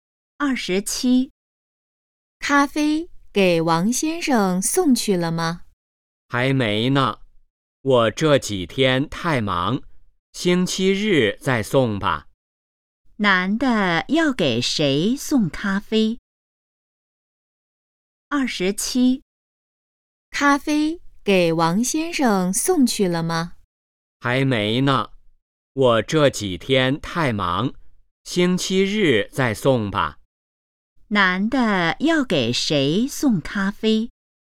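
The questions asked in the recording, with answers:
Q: 男的要给谁送咖啡?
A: 王先生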